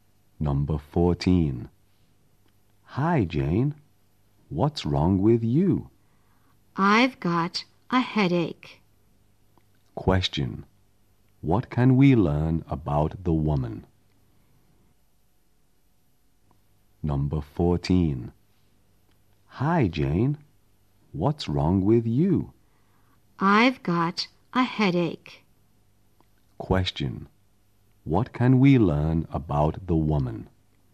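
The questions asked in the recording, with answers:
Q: Question. What can we learn about the woman?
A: She has a headache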